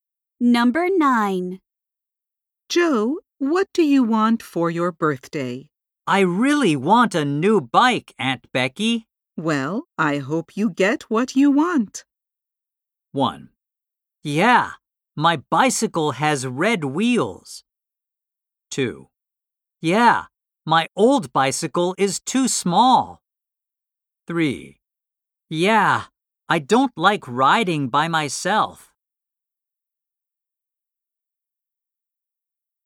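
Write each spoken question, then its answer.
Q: Well, I hope you get what you want.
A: 2: Yeah, my old bicycle is too small.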